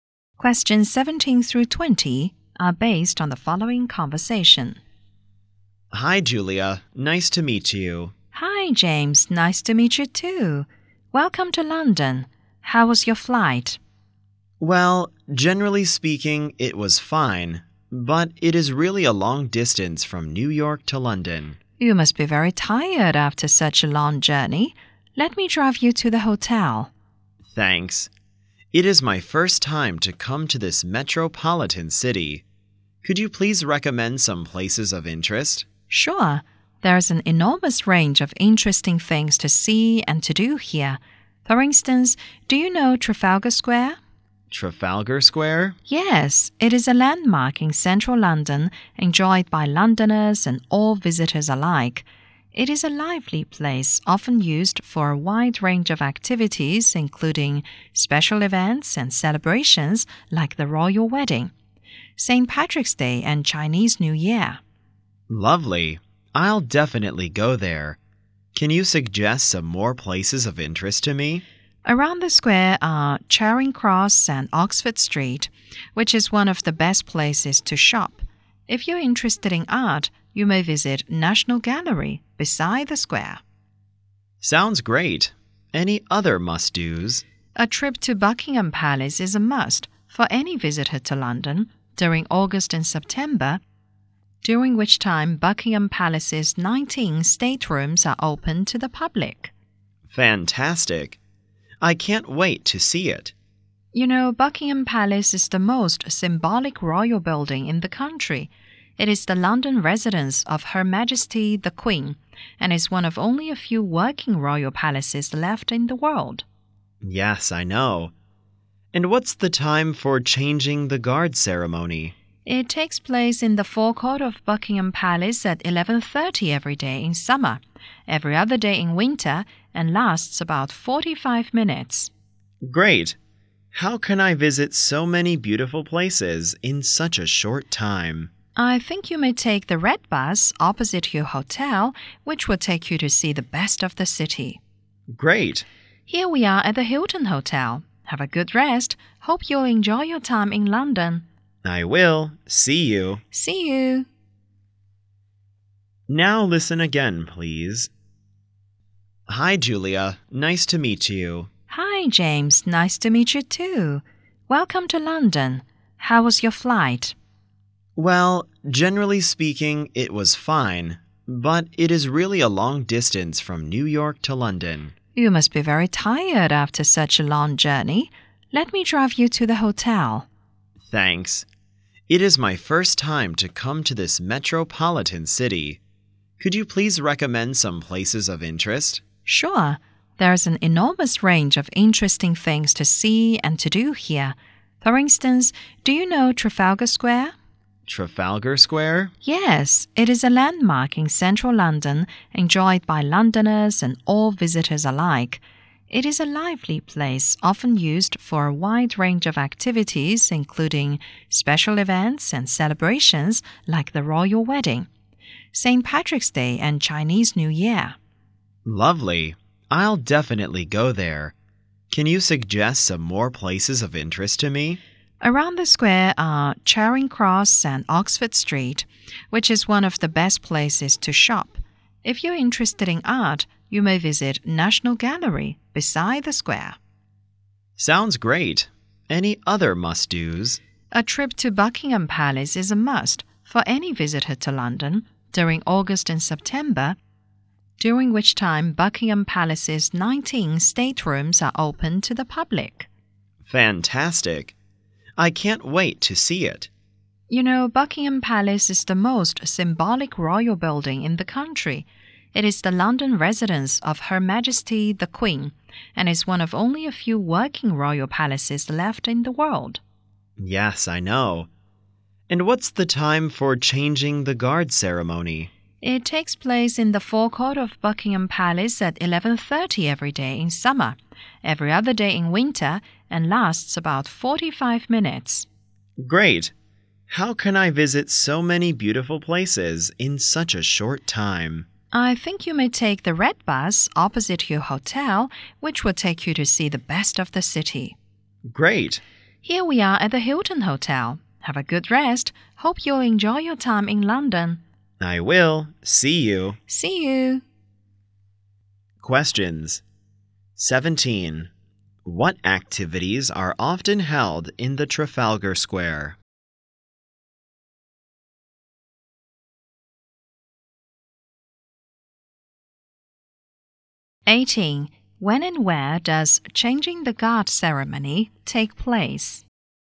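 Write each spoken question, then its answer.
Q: What activities are often held in the Trafalgar Square?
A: Special events and celebrations like the royal wedding, St. Patrick's Day and Chinese New Year

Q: When and where does changing the guard ceremony take place?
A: At 11:30 in the forecourt of Buckingham Palace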